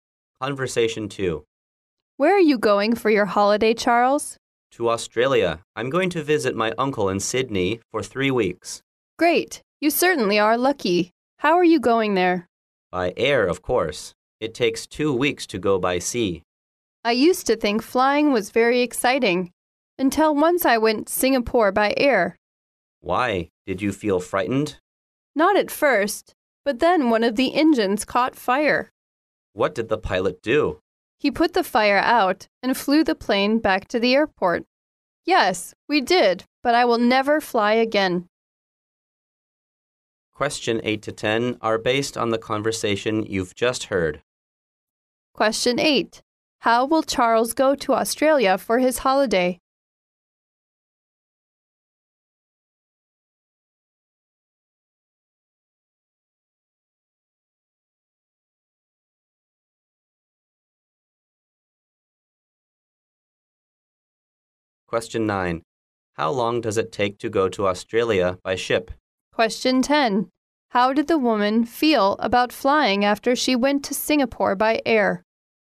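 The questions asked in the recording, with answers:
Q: How will Charles go to Australia for his holiday?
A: By air

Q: How long does it take to go to Australia by ship?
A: Two weeks

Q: How did the woman feel about flying after she went to Singapore by air?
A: She decided never to fly again.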